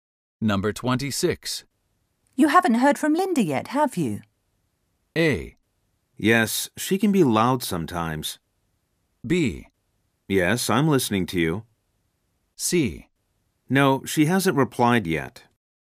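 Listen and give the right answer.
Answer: C: No, she hasn't replied yet.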